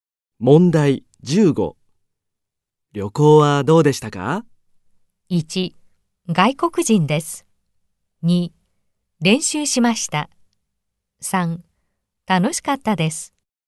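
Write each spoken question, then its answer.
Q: 旅行はどうでしたか?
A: 3: 楽しかったです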